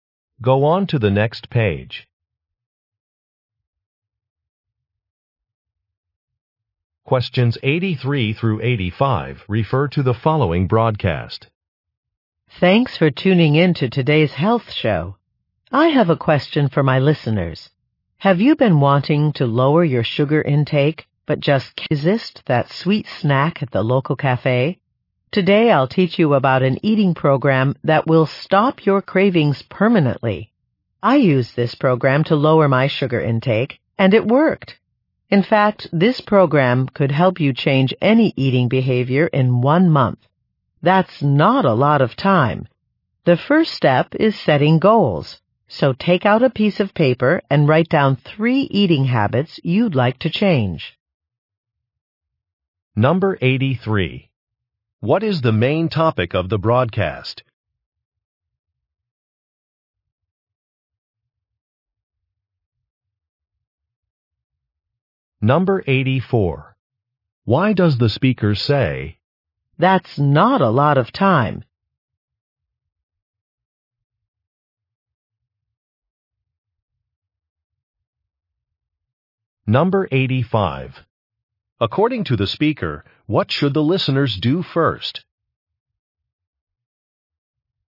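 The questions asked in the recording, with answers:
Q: What is the main topic of the broadcast?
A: An eating program to reduce sugar cravings

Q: According to the speaker, what should the listeners do first?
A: Write down three eating habits to change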